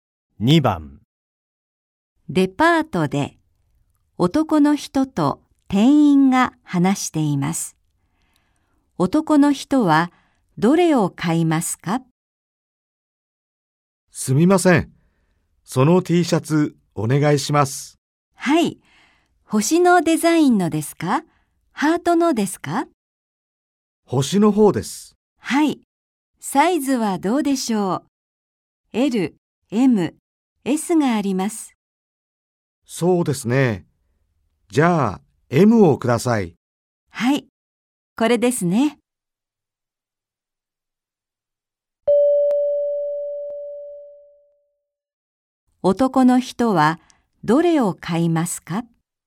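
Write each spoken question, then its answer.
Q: 男の人はどれを買いますか?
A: 星のデザインのTシャツ、Mサイズ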